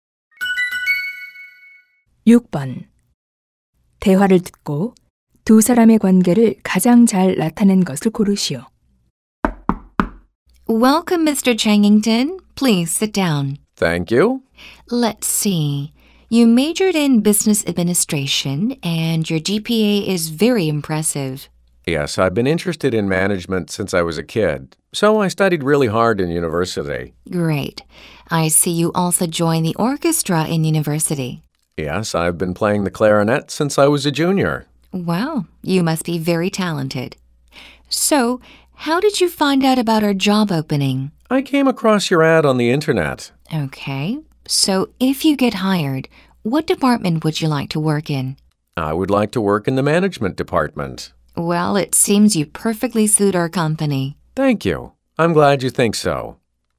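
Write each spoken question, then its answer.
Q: 대화를 듣고 두 사람의 관계를 가장 잘 나타낸 것을 고르시오.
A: 면접관과 입사 지원자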